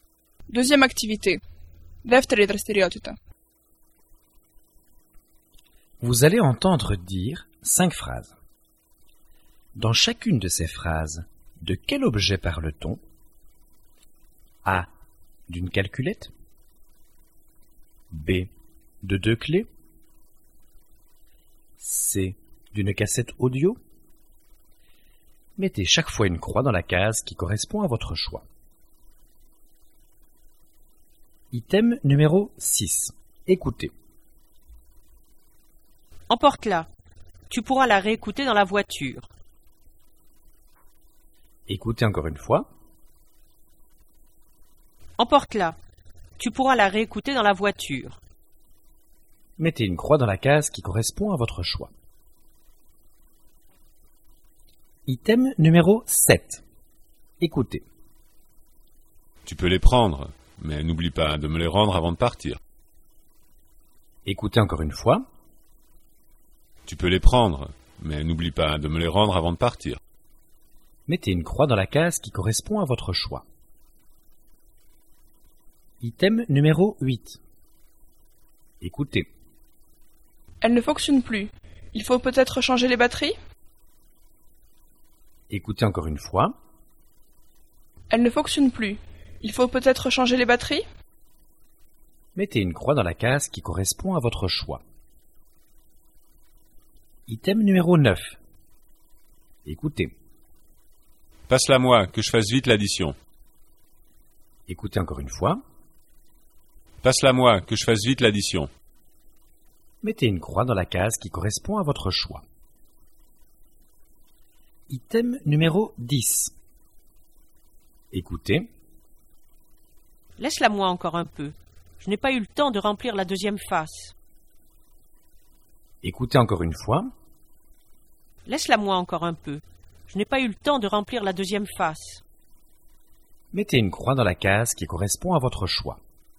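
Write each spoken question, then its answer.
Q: Dans chacune de ces phrases, de quel objet parle-t-on?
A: C: D'une cassette audio

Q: Dans chacune de ces phrases, de quel objet parle-t-on?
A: B: De deux clés

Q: Dans chacune de ces phrases, de quel objet parle-t-on?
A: A: D'une calculette

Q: Dans chacune de ces phrases, de quel objet parle-t-on?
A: C: D'une cassette audio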